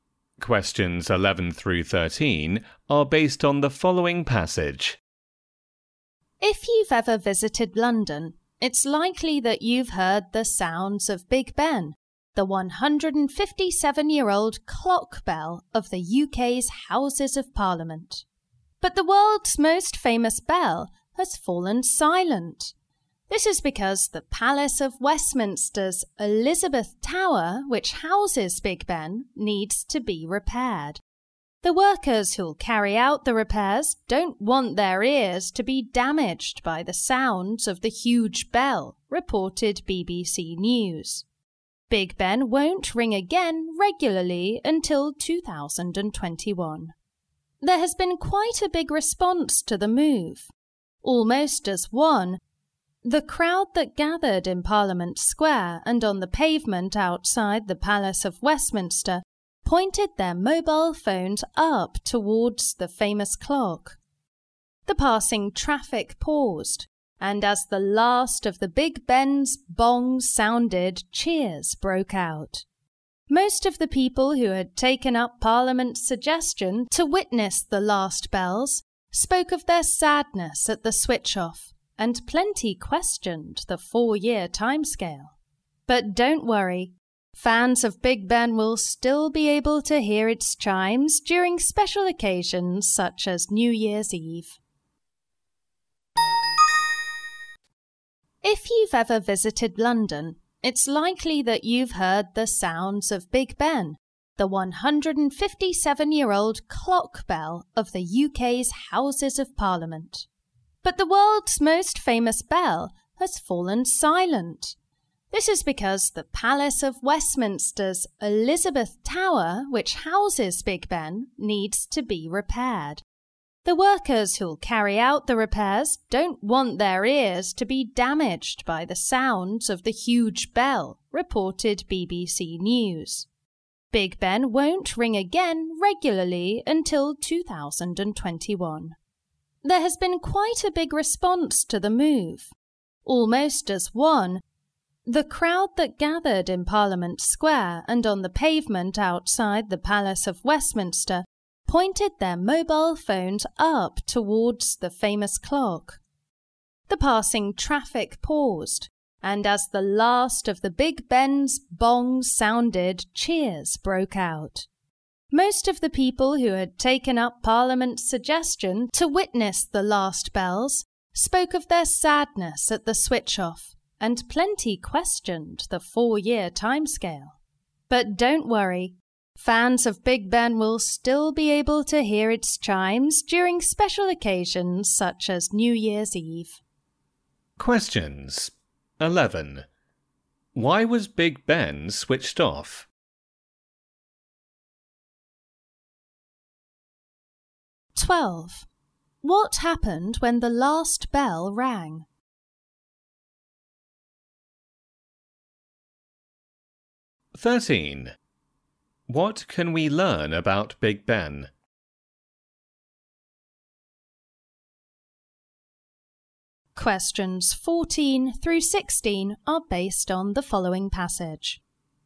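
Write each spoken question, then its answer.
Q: Why was Big Ben switched off?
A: To protect the repair workers' ears while the tower is repaired

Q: What happened when the last bell rang?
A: The crowd pointed their phones at the clock, traffic paused, and cheers broke out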